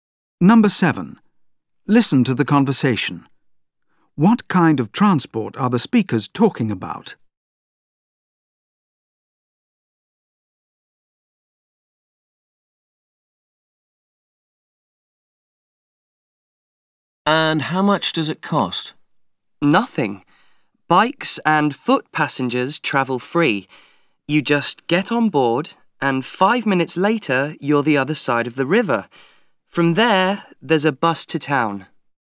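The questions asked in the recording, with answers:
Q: What kind of transport are the speakers talking about?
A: A ferry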